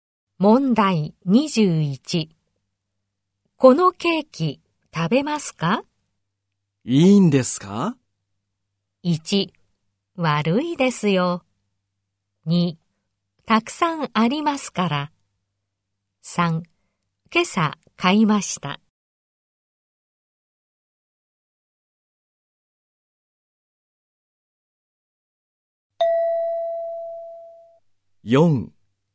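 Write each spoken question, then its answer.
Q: このケーキ食べますか?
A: 2: たくさんありますから。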